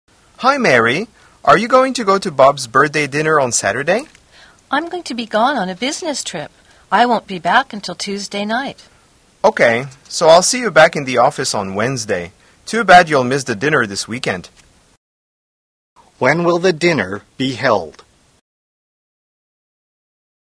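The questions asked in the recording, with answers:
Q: When will the dinner be held?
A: On Saturday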